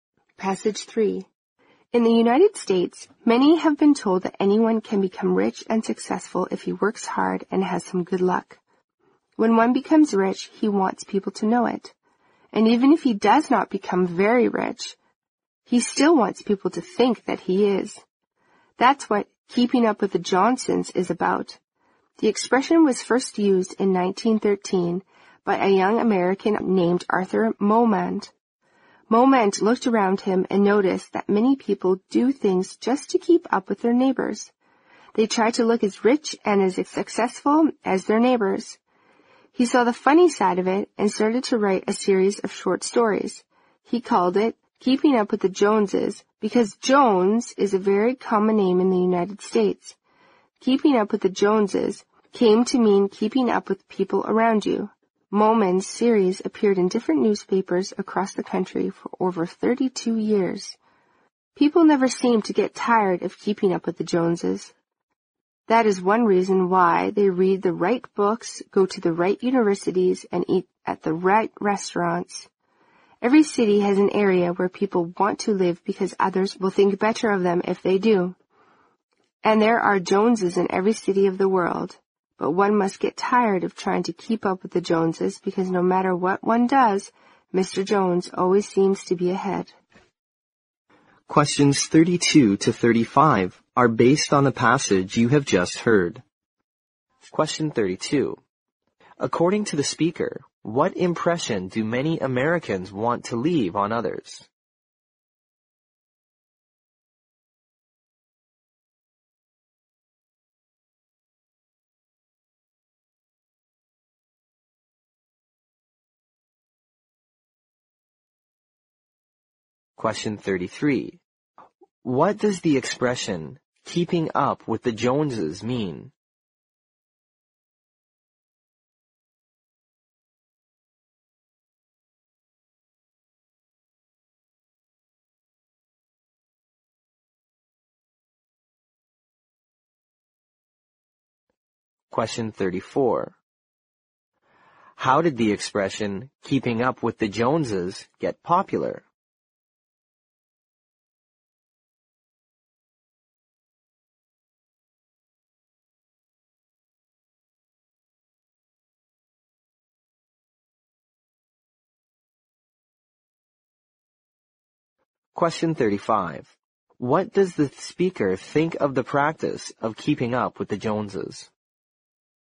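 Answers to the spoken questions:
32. That they are rich and successful
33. Keeping up with the people around you, trying to look as rich and successful as your neighbors
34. Through Arthur Momand's series of stories, which ran in newspapers across the country for over 32 years
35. It is tiring and useless, because the Joneses always seem to be ahead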